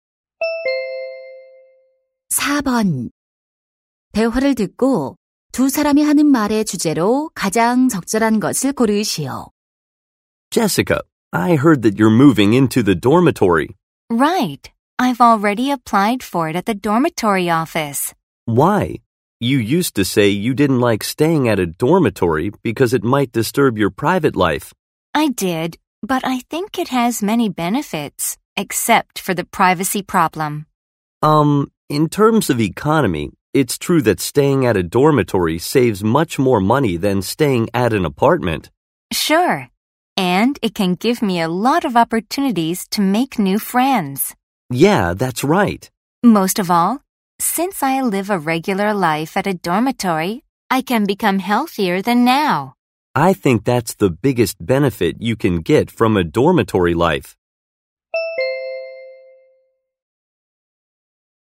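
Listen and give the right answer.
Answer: 기숙사 생활의 장점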